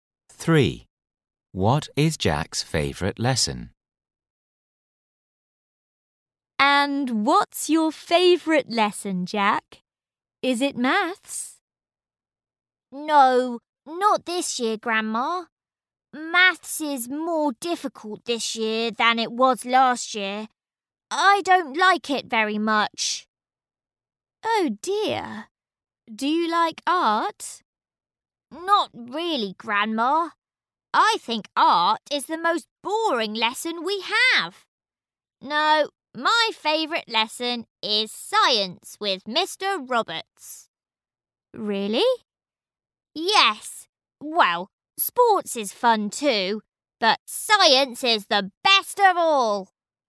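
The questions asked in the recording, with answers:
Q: What is Jack's favourite lesson?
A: Science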